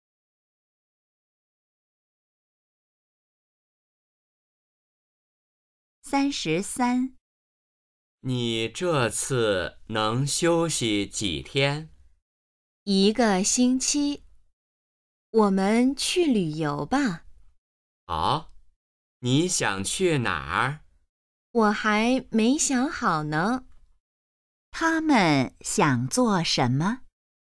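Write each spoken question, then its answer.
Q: 他们想做什么?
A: 去旅游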